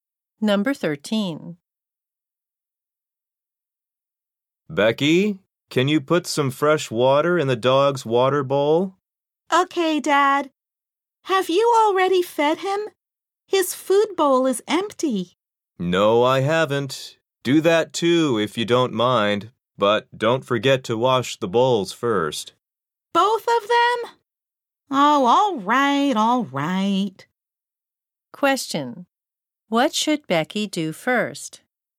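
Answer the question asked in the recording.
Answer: Wash the dog's bowls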